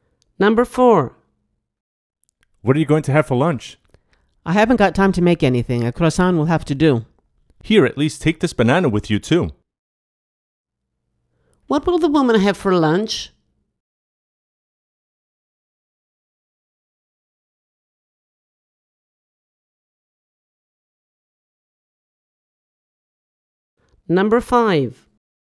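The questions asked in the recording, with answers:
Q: What will the woman have for lunch?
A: A croissant and a banana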